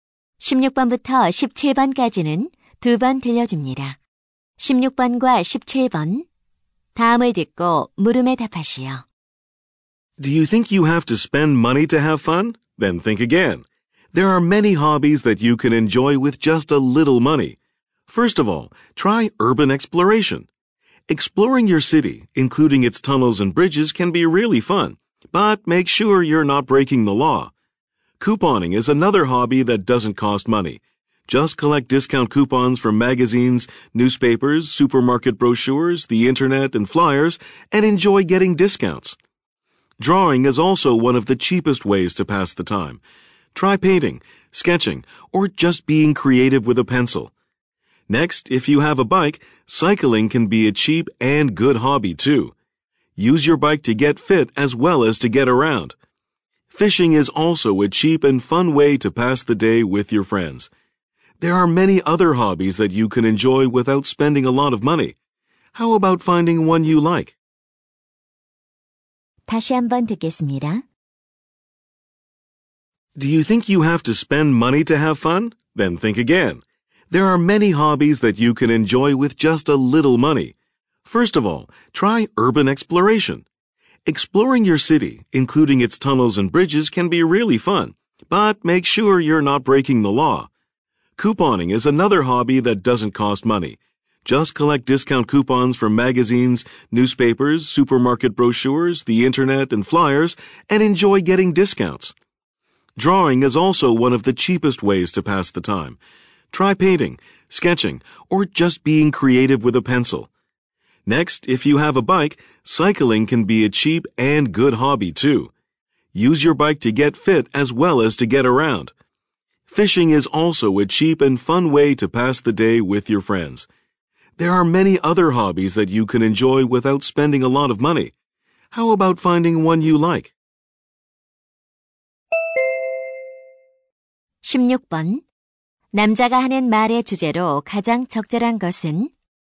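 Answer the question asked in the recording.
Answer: 돈이 적게 드는 취미들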